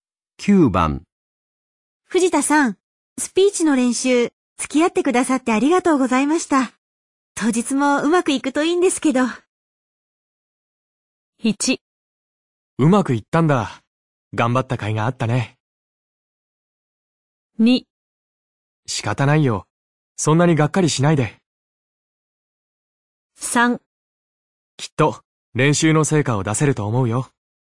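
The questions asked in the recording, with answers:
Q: 藤田さん、スピーチの練習、付き合ってくださってありがとうございました。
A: 3: きっと、練習の成果を出せると思うよ。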